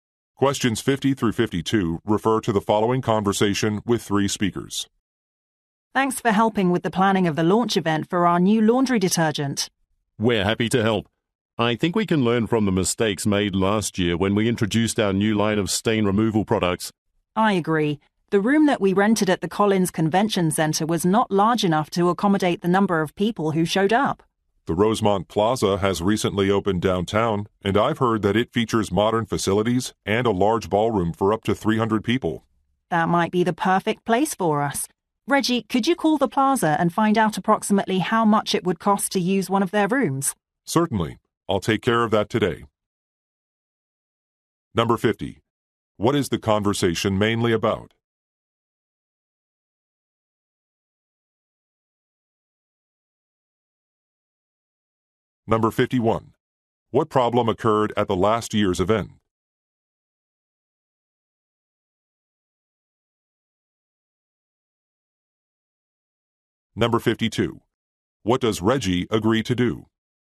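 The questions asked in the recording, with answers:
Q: What is the conversation mainly about?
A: Planning a product launch event

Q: What problem occurred at the last year's event?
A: The room was too small

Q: What does Reggie agree to do?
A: Call the plaza to ask about the cost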